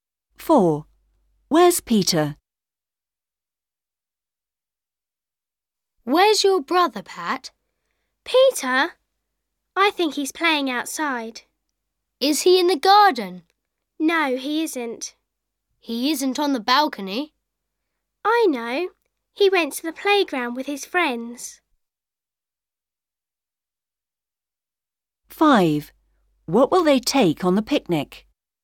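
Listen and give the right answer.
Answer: at the playground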